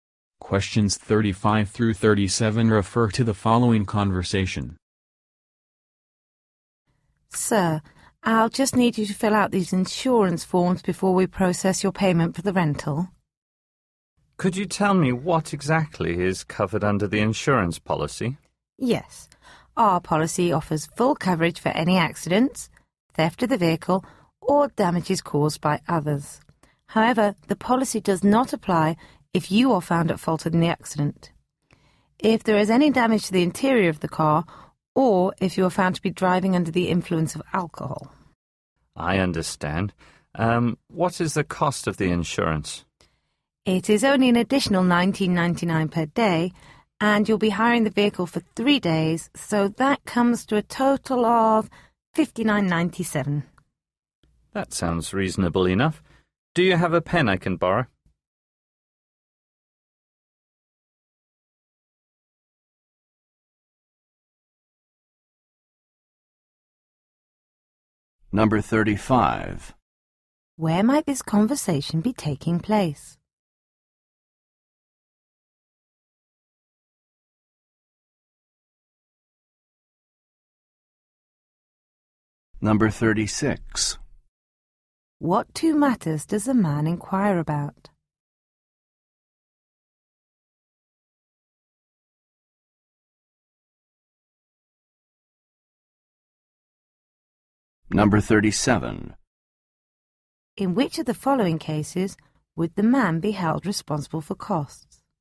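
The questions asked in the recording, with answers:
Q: Where might this conversation be taking place?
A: At a car rental office

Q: What two matters does the man inquire about?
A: What the insurance covers and its cost

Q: In which of the following cases would the man be held responsible for costs?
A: If he is at fault, damages the interior, or drives drunk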